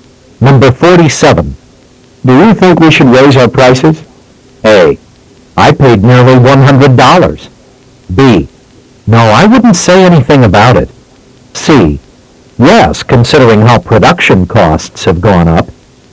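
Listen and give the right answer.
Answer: C: Yes, considering how production costs have gone up.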